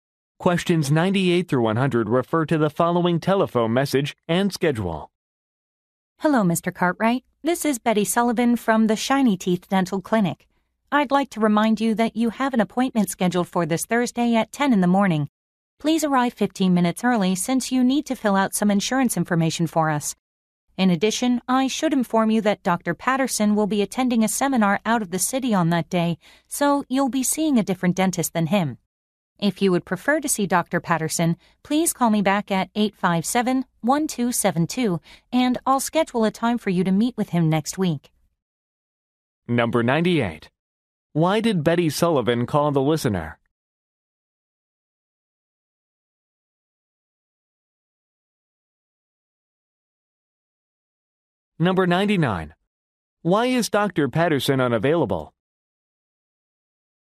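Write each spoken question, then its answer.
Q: Why did Betty Sullivan call the listener?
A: To remind him of an appointment

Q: Why is Dr. Patterson unavailable?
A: He is attending a seminar out of the city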